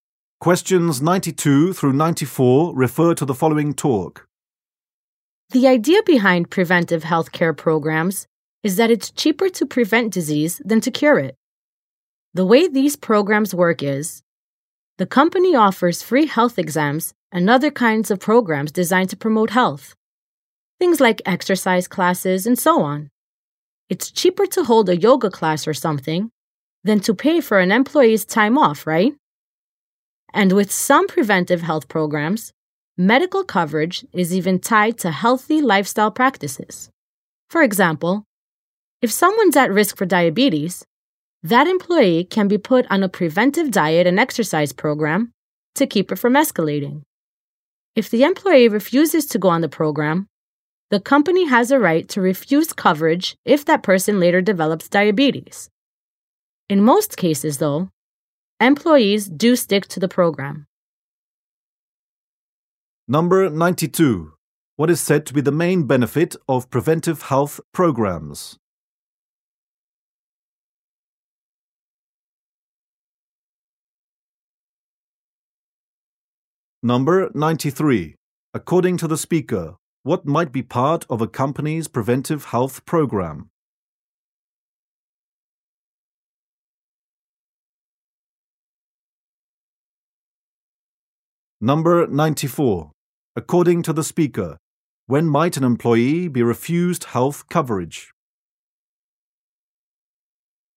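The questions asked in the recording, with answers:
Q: What is said to be the main benefit of preventive health programs?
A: It is cheaper to prevent disease than to cure it

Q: According to the speaker, what might be part of a company's preventive health program?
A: Free health exams and exercise classes

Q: According to the speaker, when might an employee be refused health coverage?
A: If they refuse to go on the preventive program and later develop the disease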